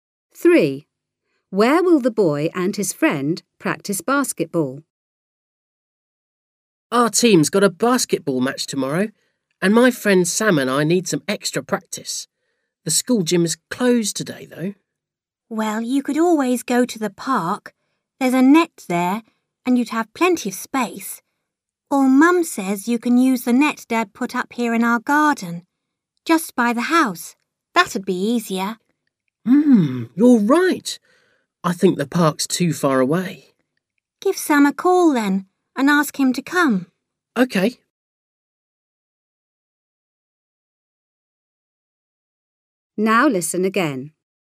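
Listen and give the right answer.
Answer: In the garden at home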